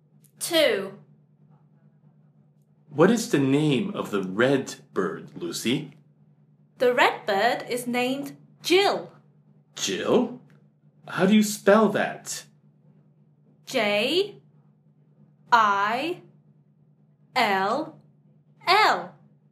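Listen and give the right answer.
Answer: Jill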